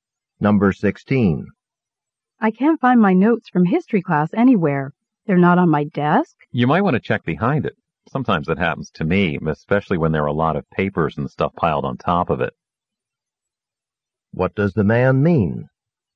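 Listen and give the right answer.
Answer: The notes may have fallen behind the desk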